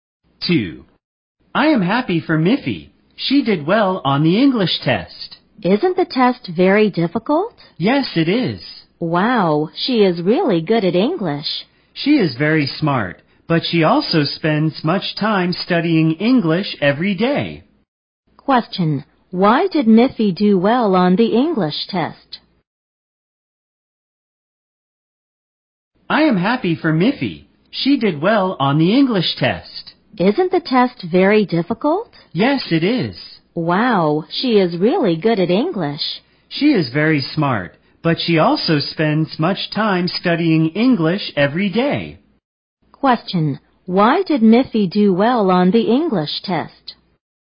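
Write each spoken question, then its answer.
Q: Question, why did Miffy do well on the English test?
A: She is smart and spends much time studying English every day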